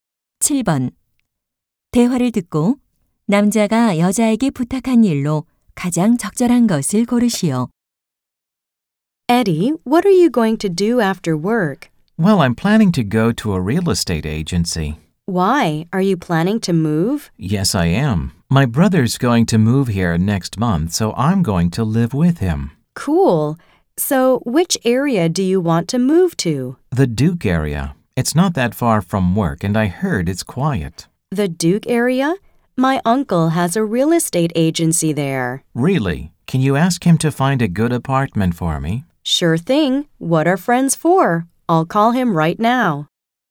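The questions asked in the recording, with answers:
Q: 대화를 듣고 남자가 여자에게 부탁한 일로 가장 적절한 것을 고르시오.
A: 삼촌에게 좋은 아파트를 찾아 달라고 부탁하기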